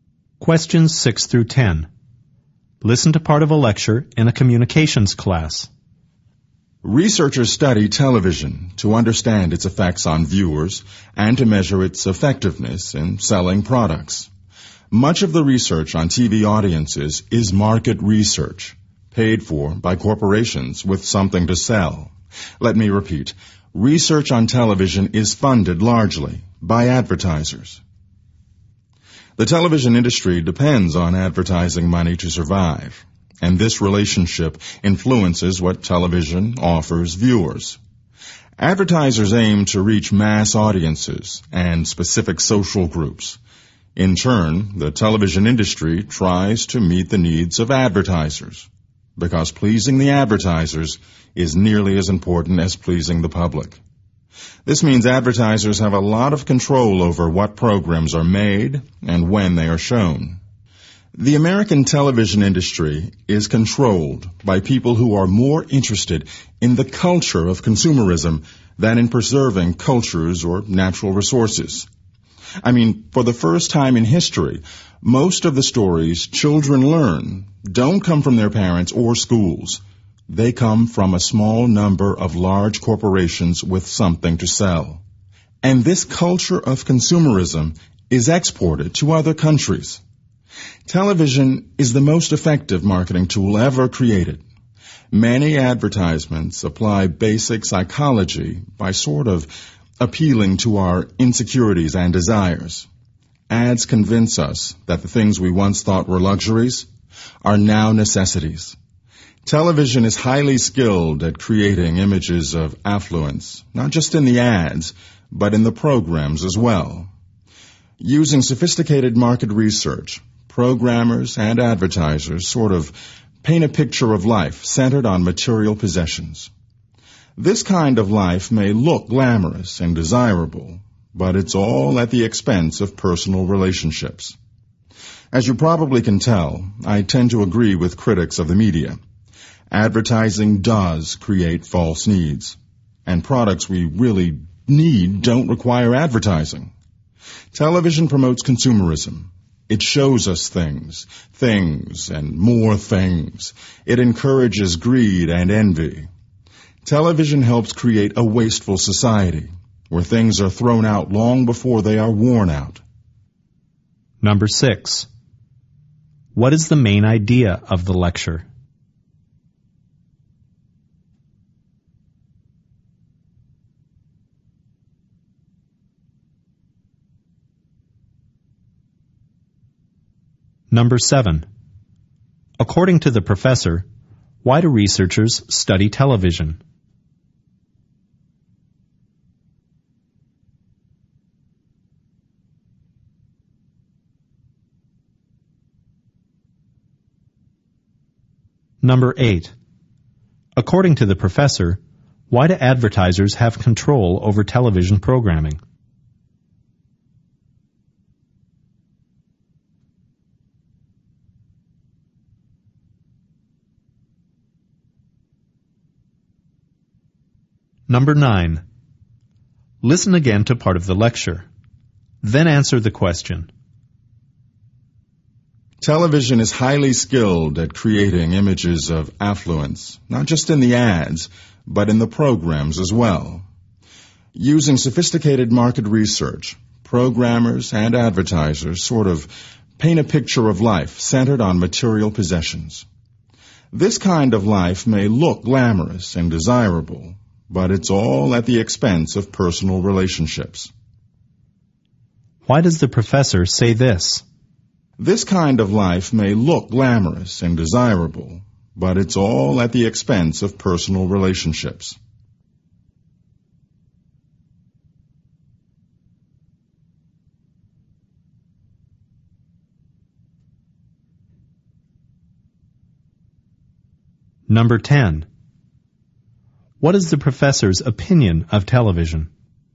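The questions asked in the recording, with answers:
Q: According to the professor, why do researchers study television?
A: To understand its effects on viewers and measure its effectiveness in selling products

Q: According to the professor, why do advertisers have control over television programming?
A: Because the television industry depends on advertising money to survive

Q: What is the professor's opinion of television?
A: It promotes consumerism, greed and a wasteful society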